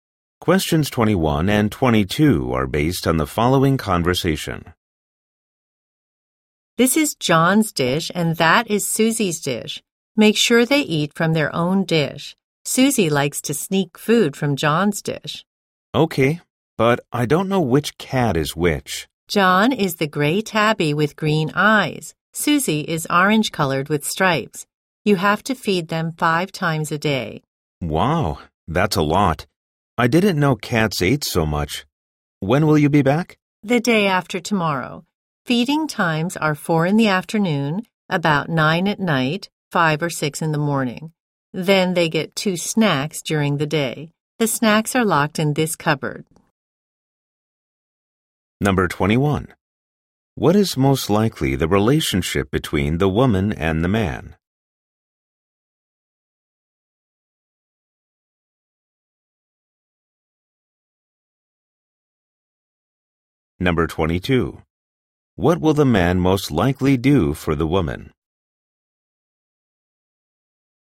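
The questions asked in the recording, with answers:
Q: What is most likely the relationship between the woman and the man?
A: Cat owner and pet sitter

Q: What will the man most likely do for the woman?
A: Feed her cats while she is away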